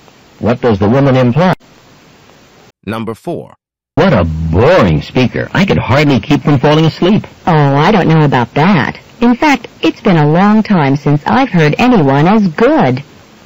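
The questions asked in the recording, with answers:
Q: What does the woman mean?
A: She thought the speaker was very good.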